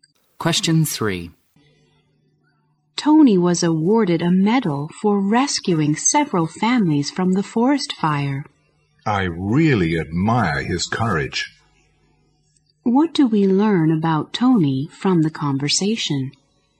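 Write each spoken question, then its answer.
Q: What do we learn about Tony from the conversation?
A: He bravely rescued several families from a forest fire.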